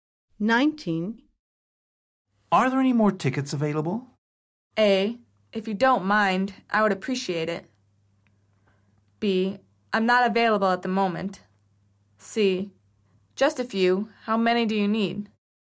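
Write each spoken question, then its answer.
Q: Are there any more tickets available?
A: C: Just a few. How many do you need?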